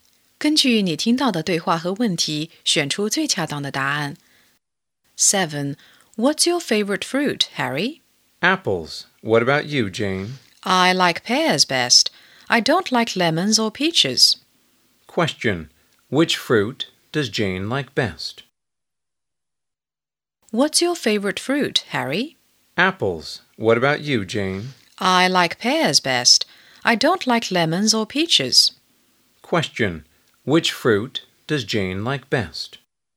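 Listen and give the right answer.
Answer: Pears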